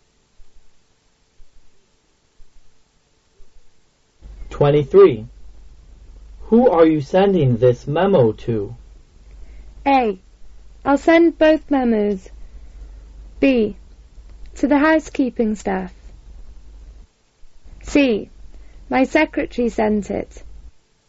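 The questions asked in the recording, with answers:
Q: Who are you sending this memo to?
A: B: To the housekeeping staff.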